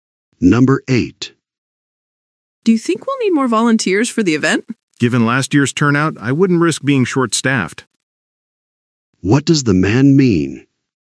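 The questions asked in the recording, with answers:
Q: What does the man mean?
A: They should get more volunteers.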